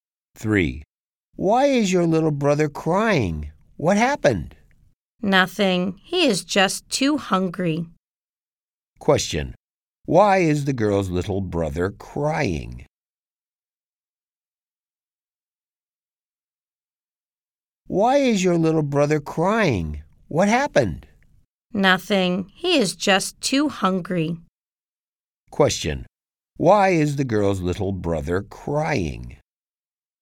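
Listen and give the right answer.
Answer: He is too hungry.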